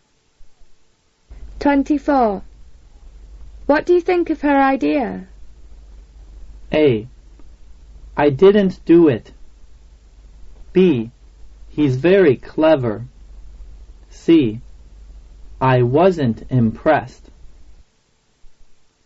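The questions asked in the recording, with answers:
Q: What do you think of her idea?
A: C: I wasn't impressed.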